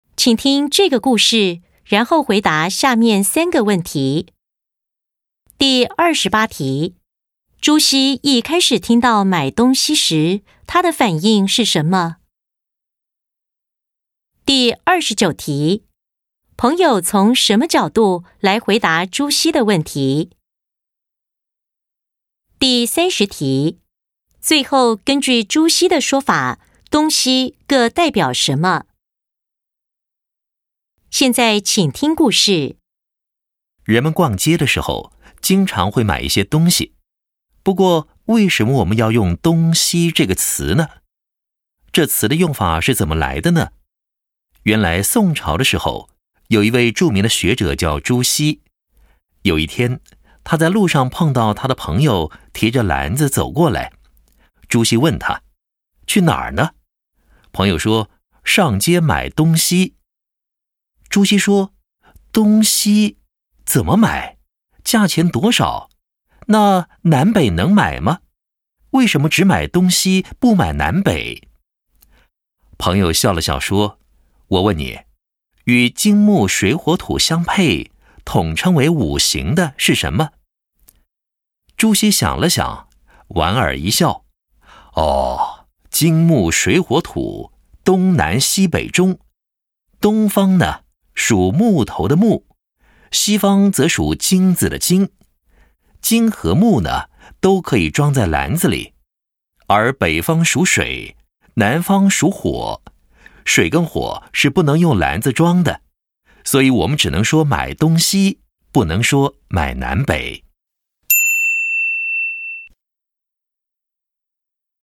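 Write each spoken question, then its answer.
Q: 朱熹一开始听到买东西时,他的反应是什么?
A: 感到奇怪,问东西怎么买、为什么不买南北

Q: 朋友从什么角度来回答朱熹的问题?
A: 从五行(金木水火土)的角度

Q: 最后根据朱熹的说法,东西各代表什么?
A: 东代表木,西代表金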